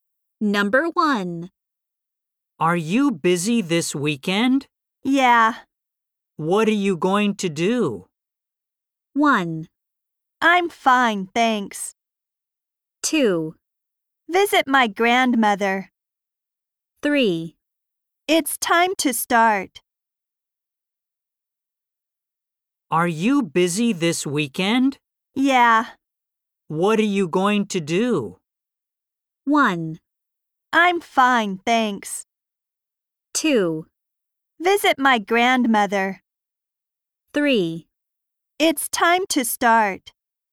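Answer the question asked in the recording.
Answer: 2: Visit my grandmother.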